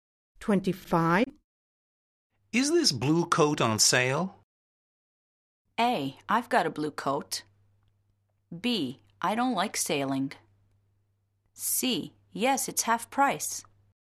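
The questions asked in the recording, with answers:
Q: Is this blue coat on sale?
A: C: Yes, it's half price.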